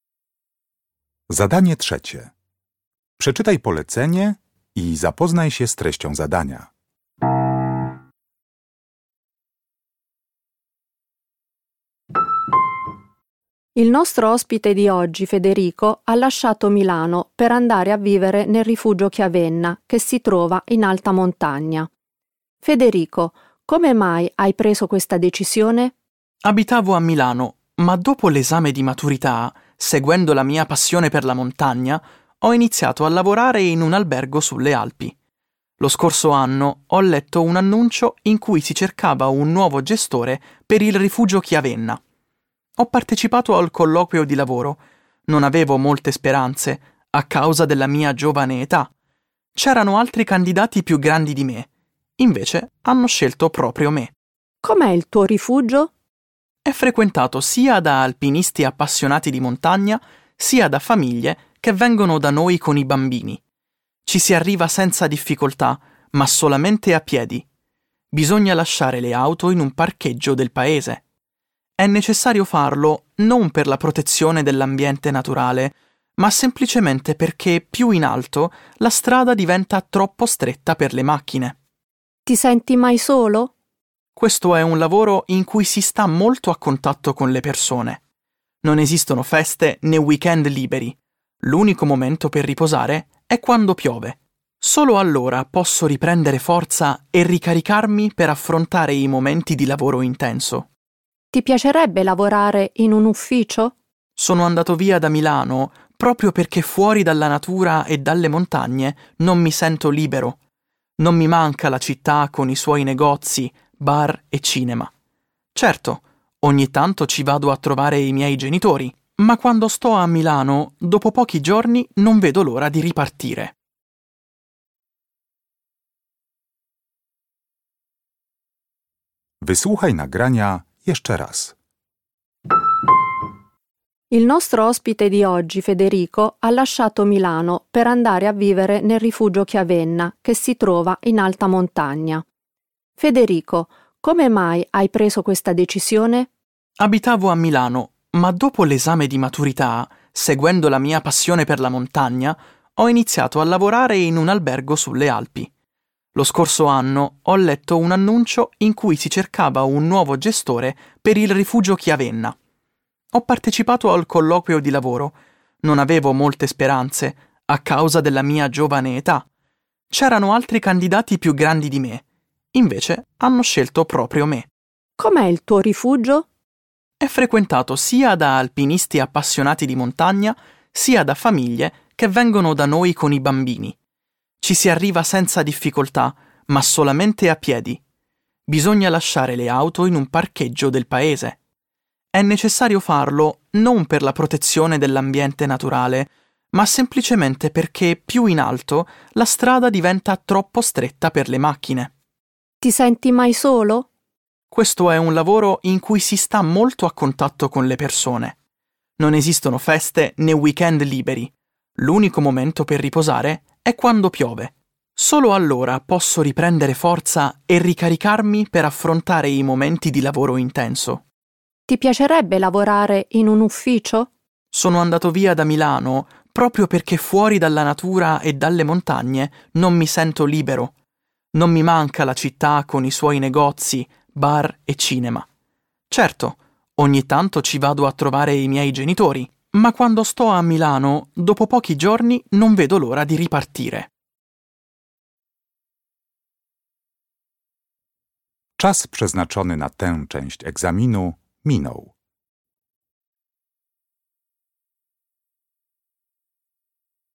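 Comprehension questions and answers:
Uruchamiając odtwarzacz z oryginalnym nagraniem CKE usłyszysz dwukrotnie wywiad z osobą prowadzącą schronisko górskie (wł. il gestore del rifugio). Na podstawie informacji zawartych w nagraniu uzupełnij luki w zdaniach 3.1.–3.4., tak aby jak najbardziej precyzyjnie oddać sens wysłuchanego tekstu. Luki należy uzupełnić w języku włoskim.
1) Federico non si aspettava di ottenere il lavoro come gestore del rifugio Chiavenna perché era di altri candidati per questo posto.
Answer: più giovane

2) Al rifugio di Federico è impossibile arrivare in auto perché .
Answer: più in alto la strada è troppo stretta

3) Federico ha tempo per riposare solamente .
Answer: quando piove

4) Federico va a Milano solo per pochi giorni per , ma non vorrebbe più viverci.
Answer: trovare i suoi genitori

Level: Poziom: podstawowy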